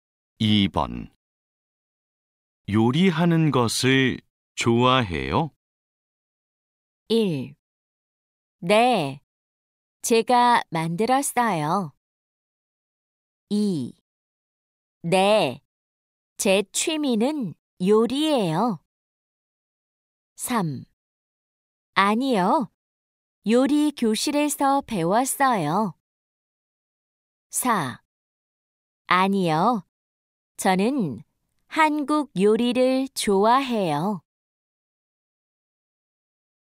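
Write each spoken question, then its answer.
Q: 요리하는 것을 좋아해요?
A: 2: 네, 제 취미는 요리예요.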